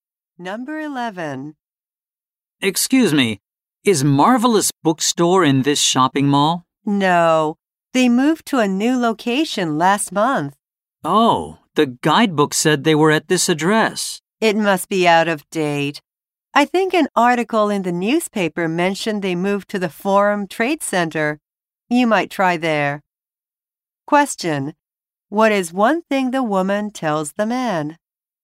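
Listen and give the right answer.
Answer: The bookstore moved to the Forum Trade Center.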